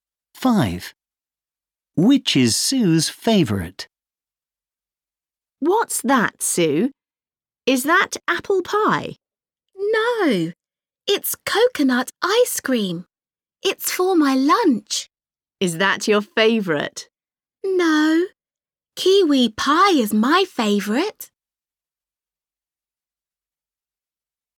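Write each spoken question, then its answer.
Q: Which is Sue's favourite?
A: kiwi pie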